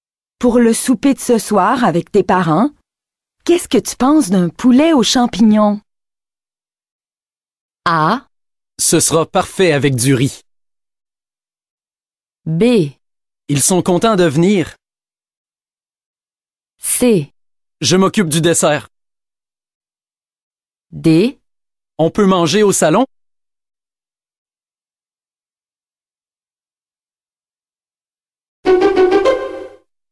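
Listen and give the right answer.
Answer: Ce sera parfait avec du riz.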